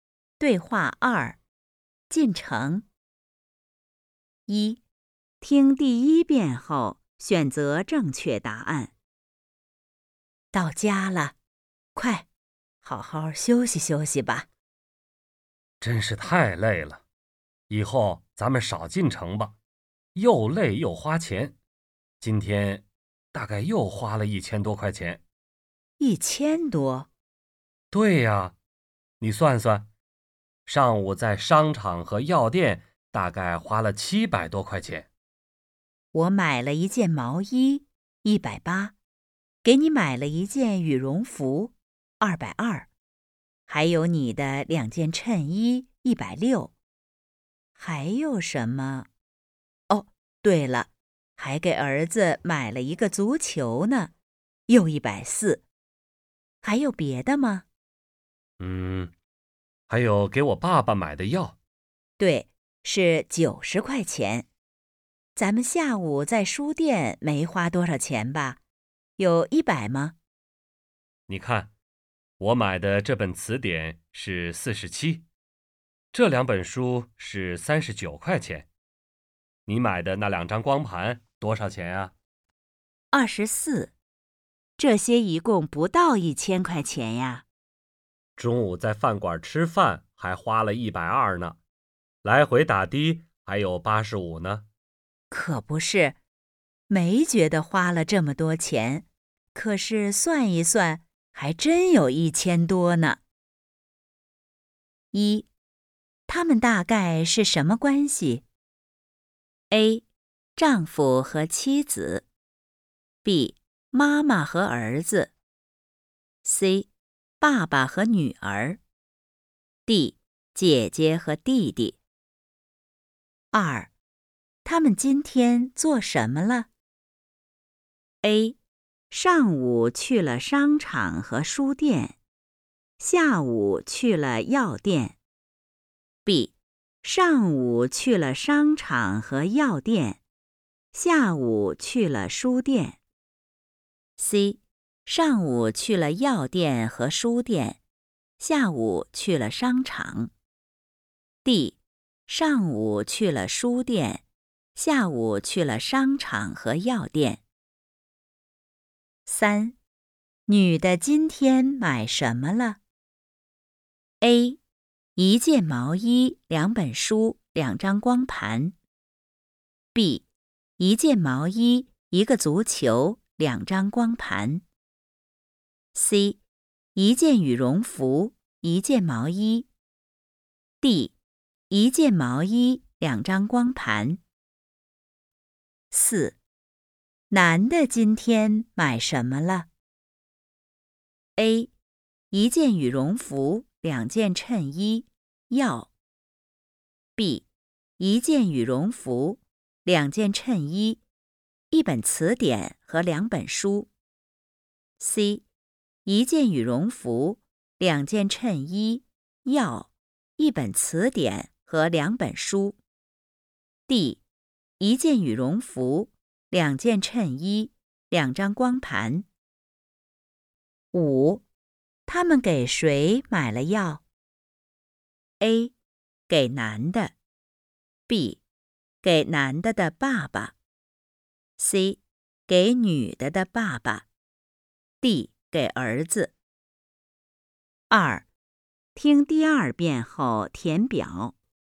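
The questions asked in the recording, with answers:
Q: 他们大概是什么关系?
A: A: 丈夫和妻子。

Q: 他们今天做什么了?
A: B: 上午去了商场和药店,下午去了书店。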